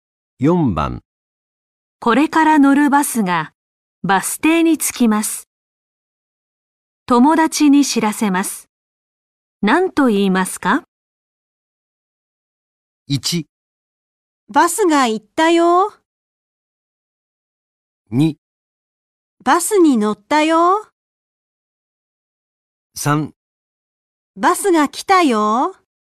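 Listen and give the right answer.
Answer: 3: バスが来たよ。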